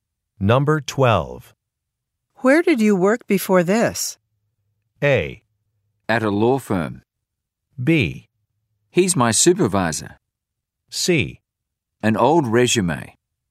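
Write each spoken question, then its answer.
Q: Where did you work before this?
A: A: At a law firm.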